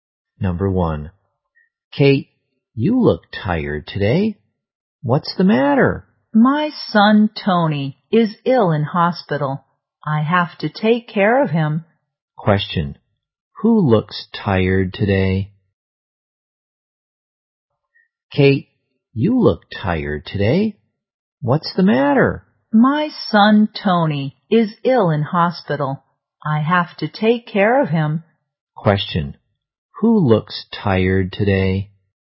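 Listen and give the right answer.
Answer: Kate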